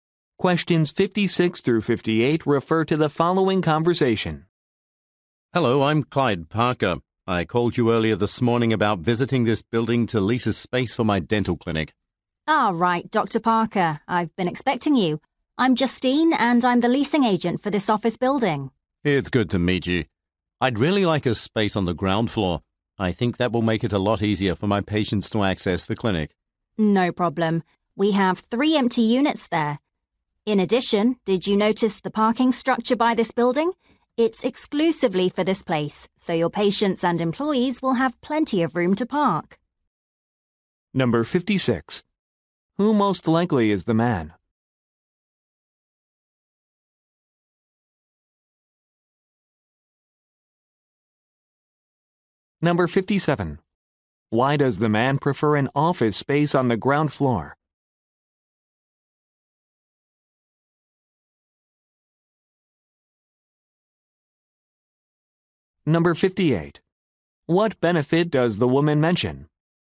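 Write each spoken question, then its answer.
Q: Who most likely is the man?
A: A dentist

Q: Why does the man prefer an office space on the ground floor?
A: It is easier for his patients to access

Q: What benefit does the woman mention?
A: A parking structure exclusively for the building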